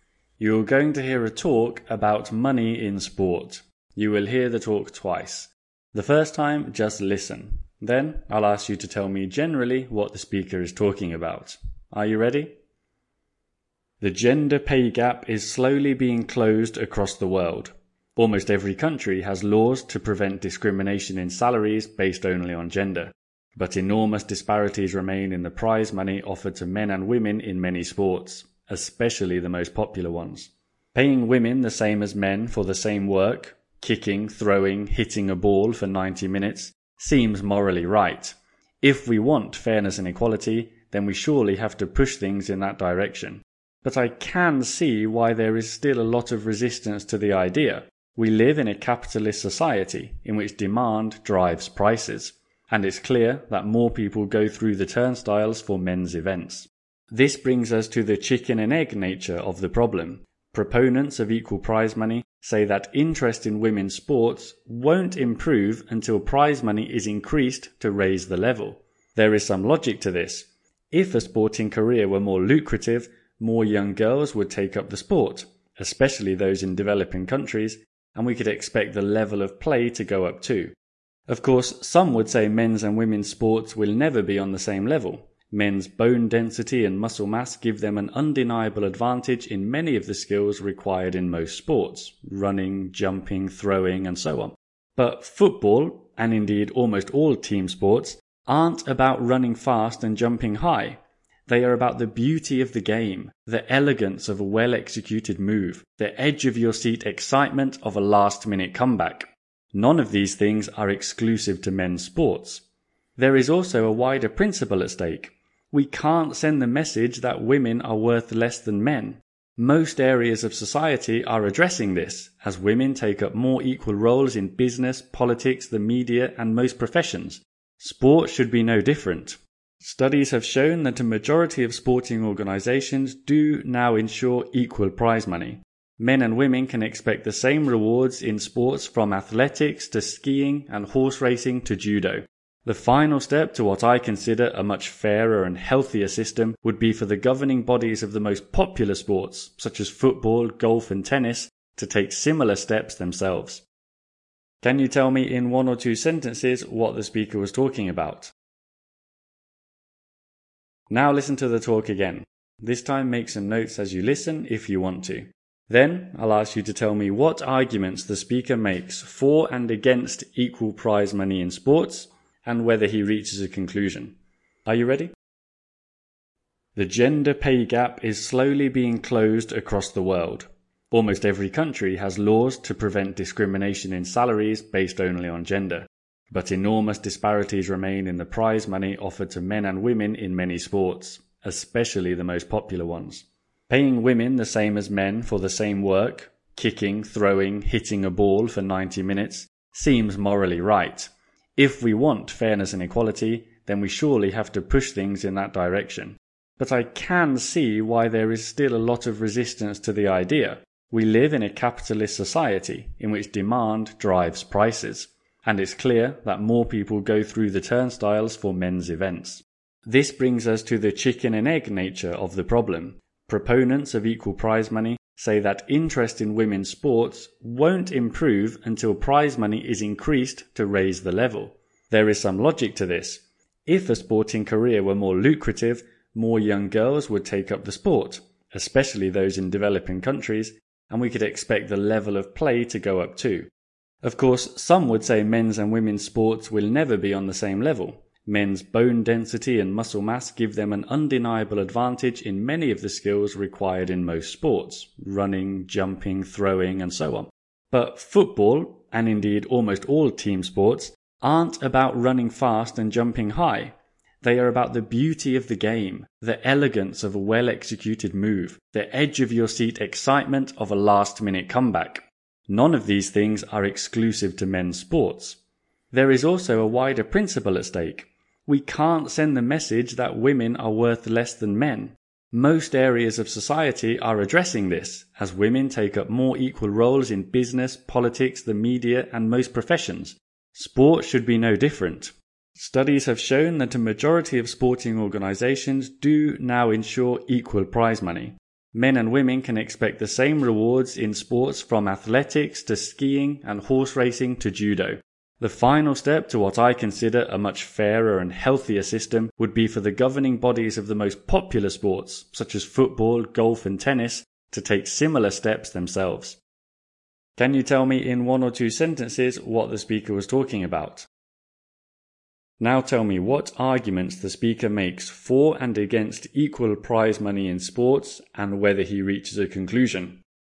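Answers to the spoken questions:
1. Whether men and women should get equal prize money in sport; the speaker argues that the gap in prize money should be closed.
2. For: it is morally fair; more money would raise interest and the level of play; team sports are about skill and excitement, not strength; women shouldn't be treated as worth less. Against: demand is lower for women's events; men have a physical advantage. Conclusion: yes, popular sports like football, golf and tennis should also offer equal prize money.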